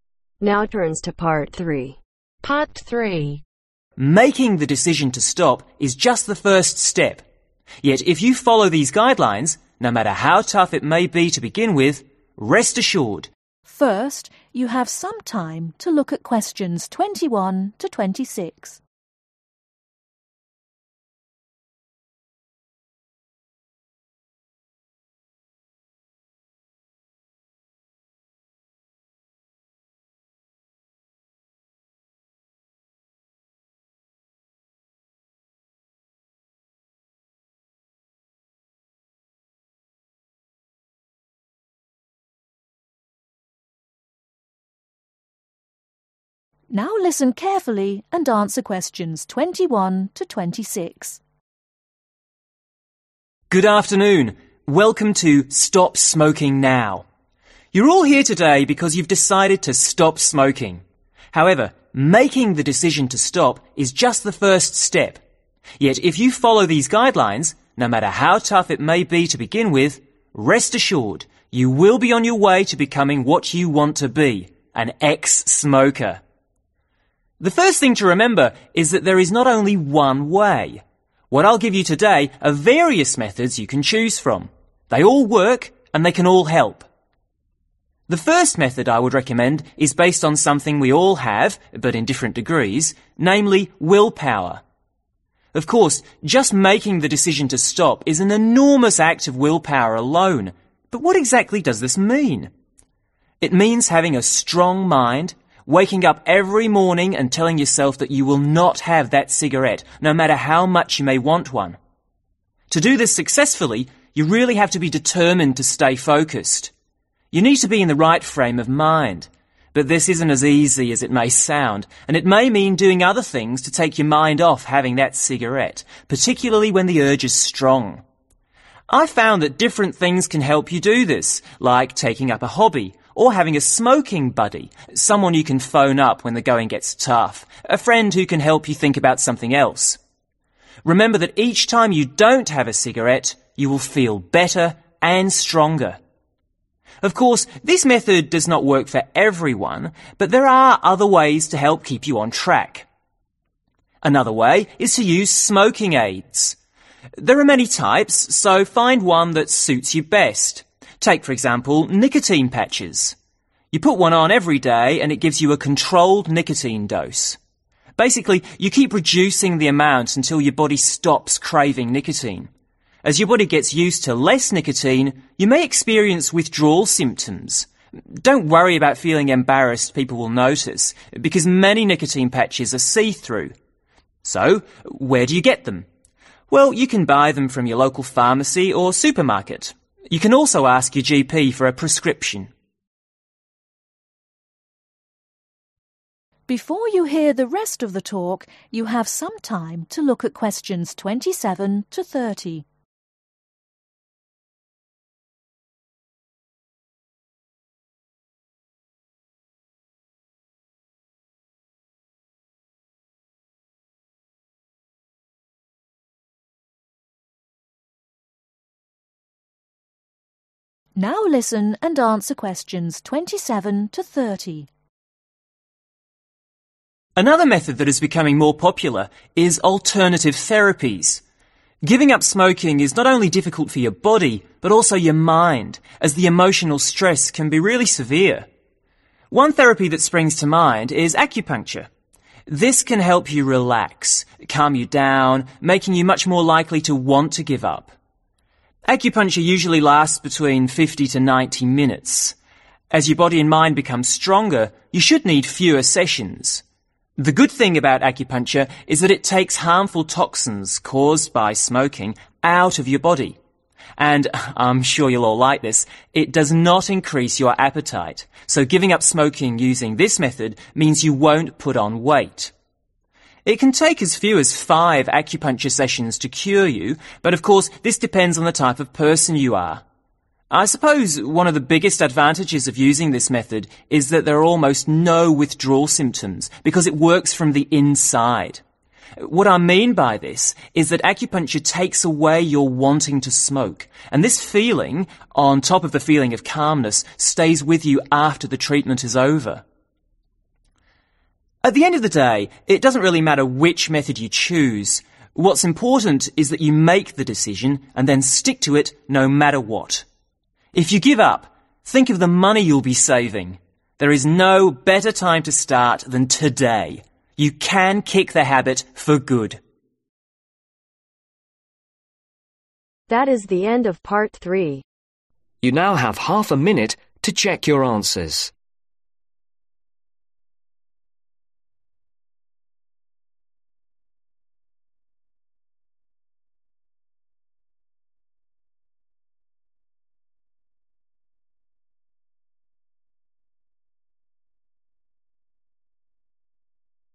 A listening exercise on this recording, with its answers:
Complete the notes below. Write NO MORE THAN TWO WORDS for each answer.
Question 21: To stop smoking , it is important to remember that there are .......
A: Various methods

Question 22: Having willpower means having the determination to ........ .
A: Stay focused

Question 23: Starting a hobby or ....... a friend can help take your mind off smoking.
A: Phoning

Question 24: Another way to keep on track is to find suitable ........ such as nicotine patches.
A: Smoking Aids

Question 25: You may experience nicotine ......... as your body becomes accustomed to less nicotine.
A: Withdrawal symptoms

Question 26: You can buy smoking aids from supermarkets or your ......... .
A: Local pharmacy

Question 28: Makes you put on weight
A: N

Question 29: Gets rid of dangerous toxins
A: Y

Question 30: Works internally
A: Y